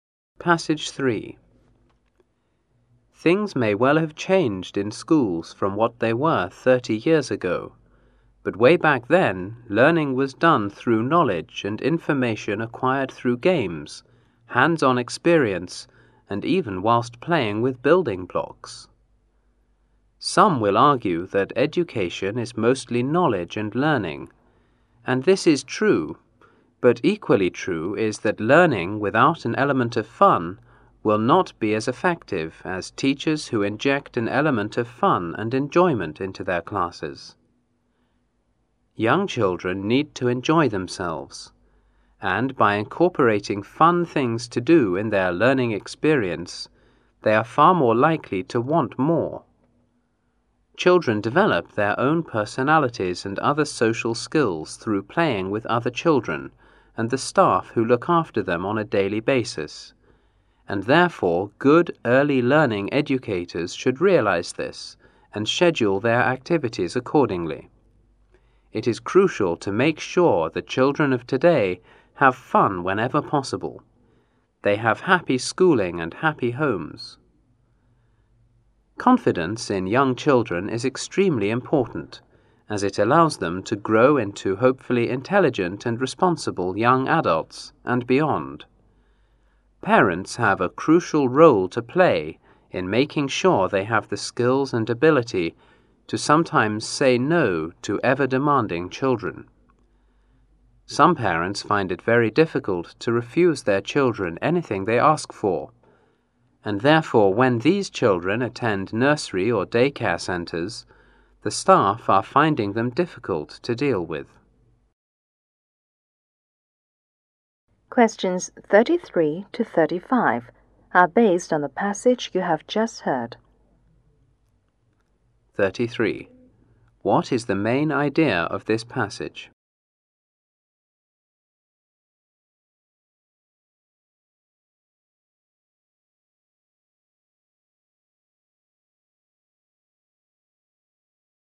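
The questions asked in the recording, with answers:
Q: According to this passage, how do children develop their own personalities and other social skills?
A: By playing with other children and the staff who look after them.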